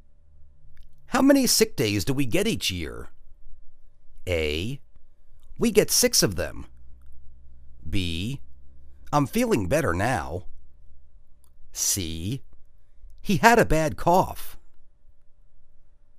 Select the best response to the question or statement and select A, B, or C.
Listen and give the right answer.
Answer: We get six of them.